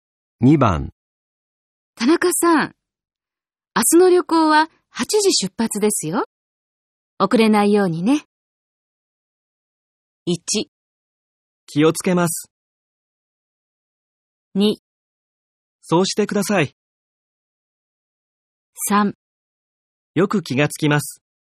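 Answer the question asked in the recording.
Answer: 1: 気をつけます。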